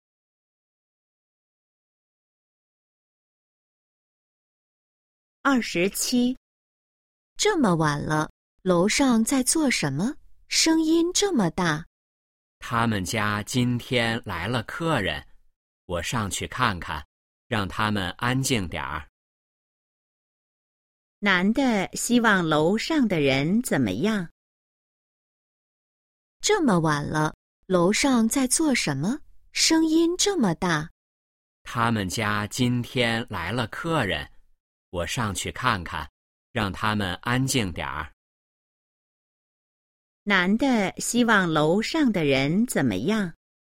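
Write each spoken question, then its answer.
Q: 男的希望楼上的人怎么样?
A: 安静点儿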